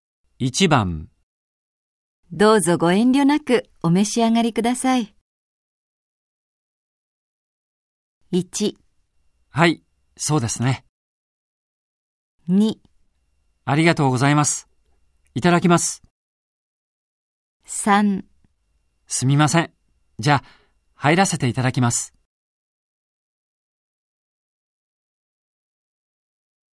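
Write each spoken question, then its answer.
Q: どうぞご遠慮なくお召し上がりください。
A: 2: ありがとうございます。いただきます。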